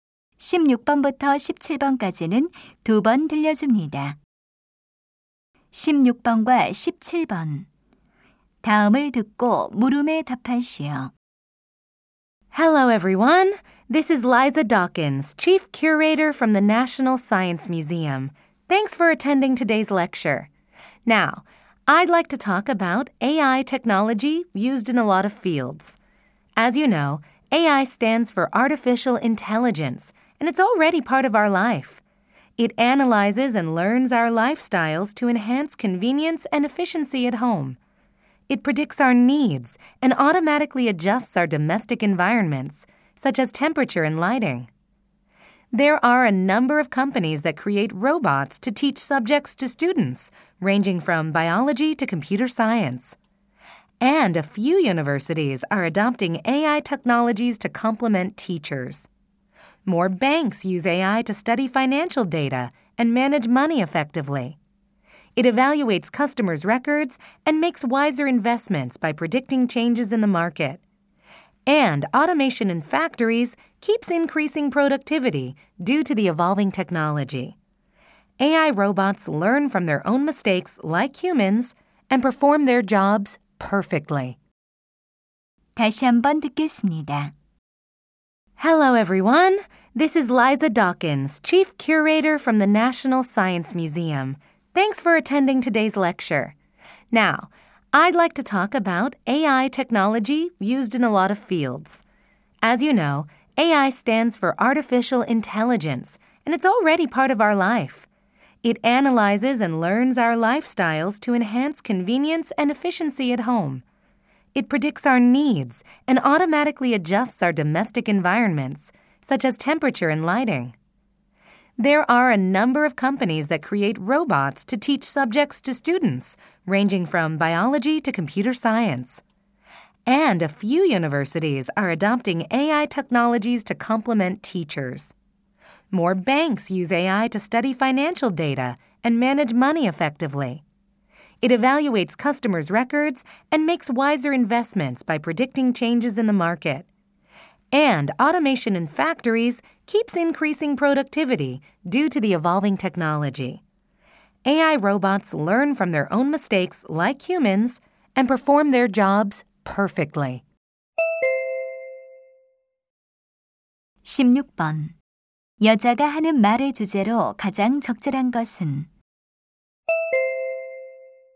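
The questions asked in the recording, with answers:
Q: 여자가 하는 말의 주제로 가장 적절한 것은?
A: 여러 분야에서 활용되는 인공지능 기술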